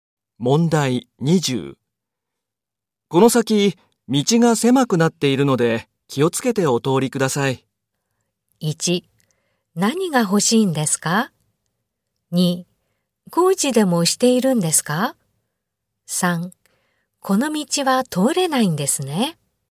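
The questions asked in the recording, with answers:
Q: この先、道が狭くなっているので気をつけてお通りください。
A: 2: 工事でもしているんですか?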